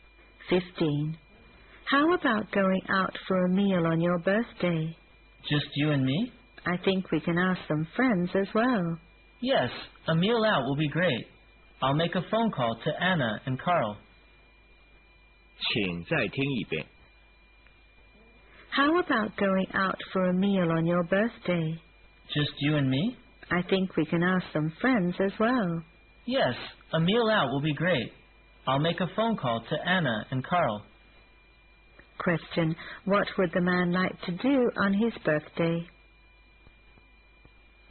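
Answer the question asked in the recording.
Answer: Go out for a meal with friends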